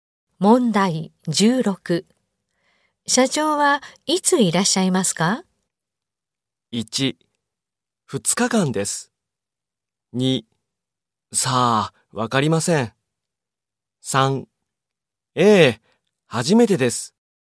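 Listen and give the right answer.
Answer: 2: さあ、わかりません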